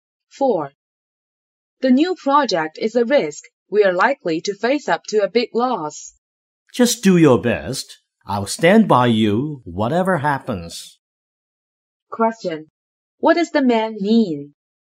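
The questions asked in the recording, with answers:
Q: What does the man mean?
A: He will support the woman whatever happens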